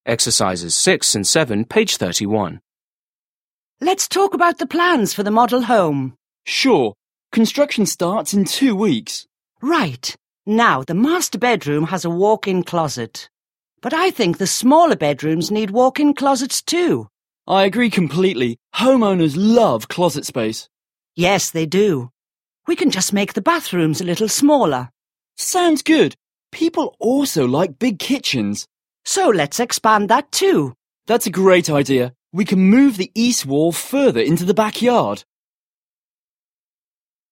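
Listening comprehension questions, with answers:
7. Listen again and complete the conversation.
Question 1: Owner: Let's 1 ___ ___ the plans for the model home.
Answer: talk about

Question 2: Manager: Sure. Construction starts in 2 _________ __________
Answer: two weeks

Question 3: But I think the 3 ___ ___ need walk-in closets, too.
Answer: smaller bedrooms

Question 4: Manager: I 4 __ __. Homeowners love closet space.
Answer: agree completely

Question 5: We can just make the 5 _________________ a little smaller.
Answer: bathrooms

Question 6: Manager: 6_____ _____. People also like big kitchens.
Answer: Sounds good

6. Listen to a conversation between a construction company owner and a manager. Mark the following statements as true (T) or false (F).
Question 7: The man suggests making the utility room smaller.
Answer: F

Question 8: The man wants to expand the kitchen into the living room.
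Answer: F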